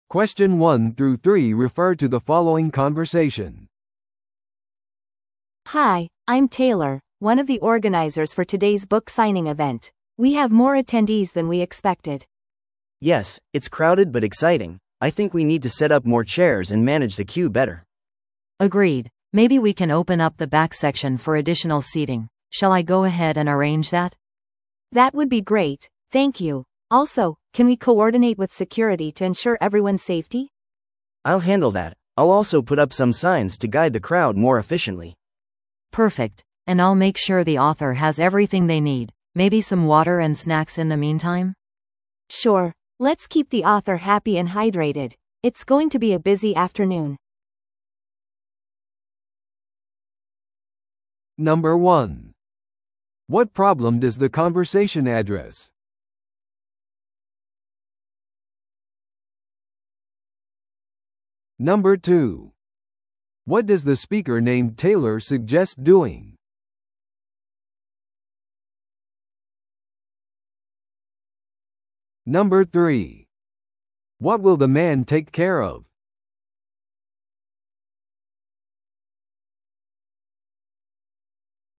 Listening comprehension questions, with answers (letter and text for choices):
Listen to the audio below and answer the questions.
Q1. What problem does the conversation address?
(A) 著者の到着遅延。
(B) 不十分なセキュリティ対策。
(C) 予想外の参加者数。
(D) サイン入り本の損傷。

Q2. What does the speaker named Taylor suggest doing?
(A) イベントを延期する。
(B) もっと椅子を設置する。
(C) サイン会を早めに開始する。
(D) 参加者数を減らす。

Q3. What will the man take care of?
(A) 追加座席の手配。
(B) 著者との連絡調整。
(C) 群衆のためのリフレッシュメントの提供。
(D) セキュリティとの連携と標識の設置。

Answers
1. (C) 予想外の参加者数。
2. (B) もっと椅子を設置する。
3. (D) セキュリティとの連携と標識の設置。

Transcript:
A: Hi, I'm Taylor, one of the organizers for today's book signing event. We have more attendees than we expected.
B: Yes, it's crowded but exciting! I think we need to set up more chairs and manage the queue better.
C: Agreed. Maybe we can open up the back section for additional seating. Shall I go ahead and arrange that?
A: That would be great, thank you. Also, can we coordinate with security to ensure everyone's safety?
B: I'll handle that. I'll also put up some signs to guide the crowd more efficiently.
C: Perfect. And I'll make sure the author has everything they need. Maybe some water and snacks in the meantime?
A: Sure, let's keep the author happy and hydrated. It's going to be a busy afternoon.